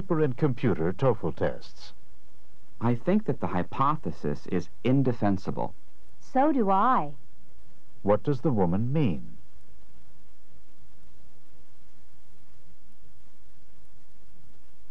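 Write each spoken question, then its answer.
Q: What does the woman mean?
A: She also thinks the hypothesis is indefensible.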